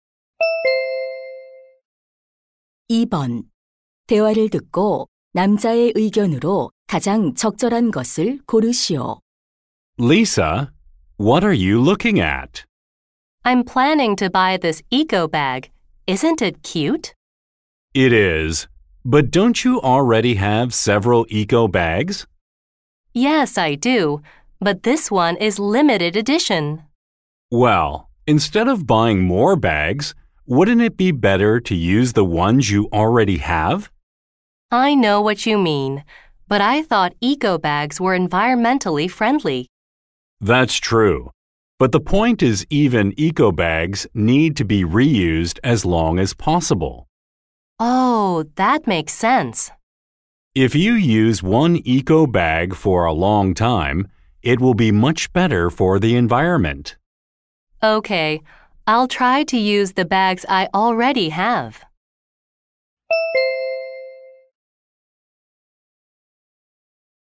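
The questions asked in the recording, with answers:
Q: 대화를 듣고 남자의 의견으로 가장 적절한 것을 고르시오.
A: 에코백도 새로 사기보다 가진 것을 오래 재사용해야 한다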